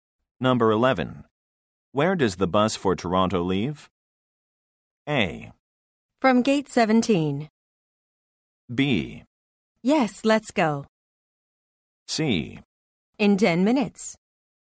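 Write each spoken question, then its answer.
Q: Where does the bus for Toronto leave?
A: A: From gate 17.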